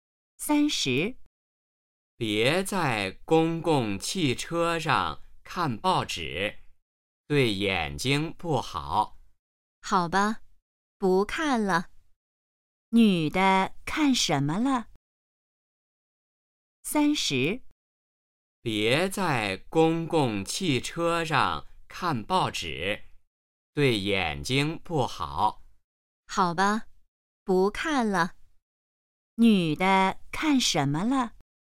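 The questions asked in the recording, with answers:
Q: 女的看什么了?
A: 报纸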